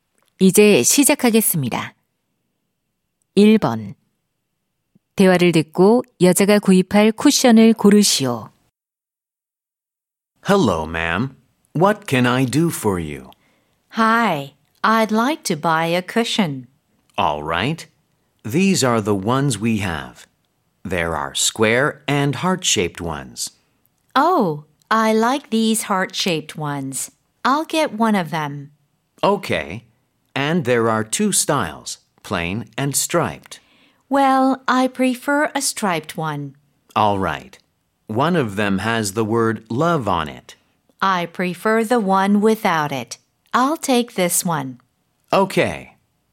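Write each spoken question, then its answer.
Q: 대화를 듣고 여자가 구입할 쿠션을 고르시오.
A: 줄무늬가 있고 'love' 글자가 없는 하트 모양 쿠션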